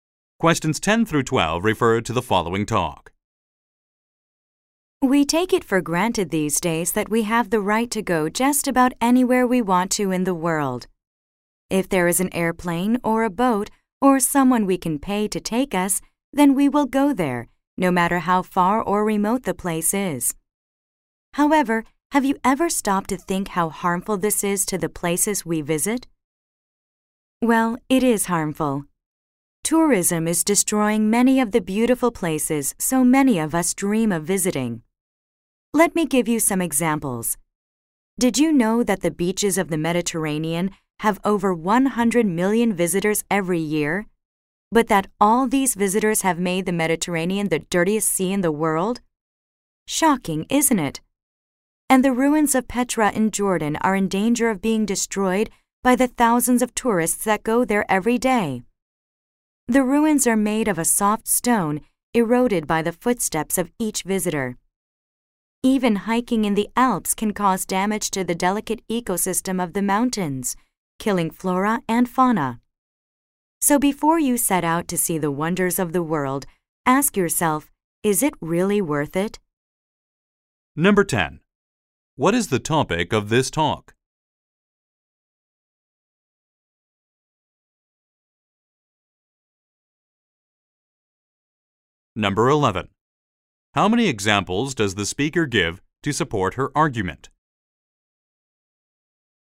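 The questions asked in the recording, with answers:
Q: What is the topic of this talk?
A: How tourism damages the places people visit.

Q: How many examples does the speaker give to support her argument?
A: Three.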